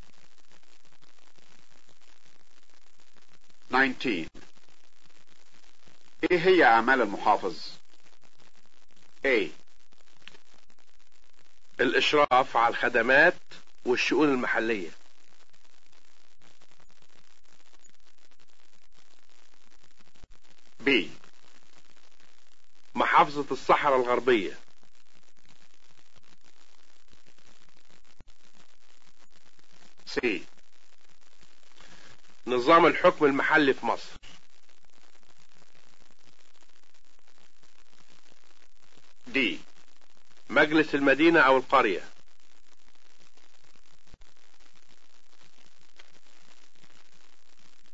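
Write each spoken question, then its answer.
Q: ايه هي اعمال المحافظ؟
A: A: الاشراف على الخدمات والشؤون المحلية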